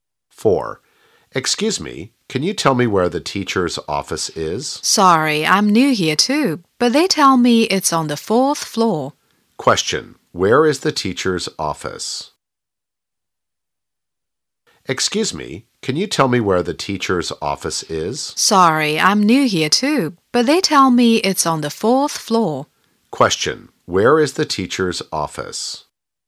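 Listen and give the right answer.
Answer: On the 4th floor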